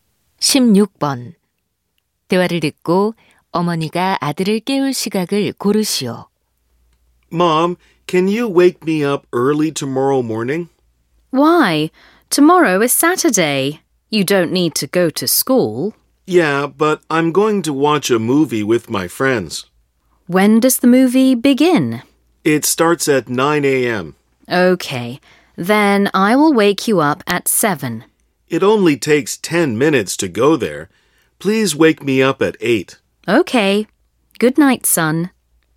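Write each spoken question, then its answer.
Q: 대화를 듣고 어머니가 아들을 깨울 시각을 고르시오.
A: 오전 8시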